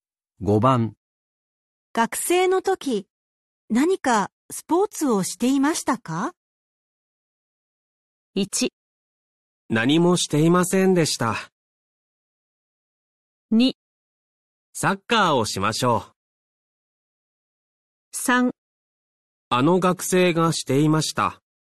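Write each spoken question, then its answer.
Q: 学生の時、何かスポーツをしていましたか?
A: 1: 何もしていませんでした。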